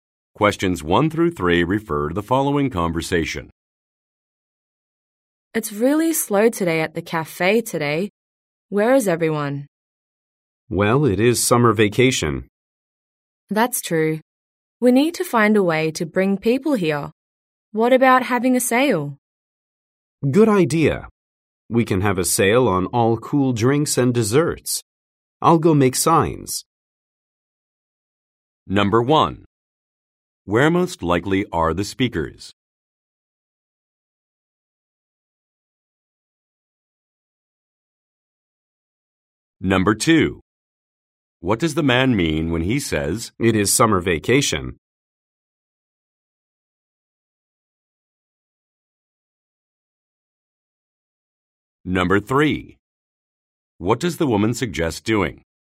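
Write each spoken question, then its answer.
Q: Where most likely are the speakers?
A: At a cafe

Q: What does the man mean when he says,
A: Many people are away on vacation, so business is slow

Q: What does the woman suggest doing?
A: Having a sale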